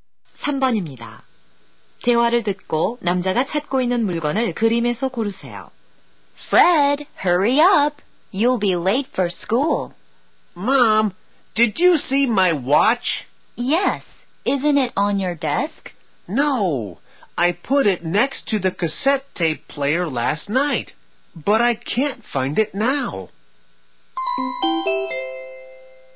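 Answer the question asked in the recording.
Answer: 시계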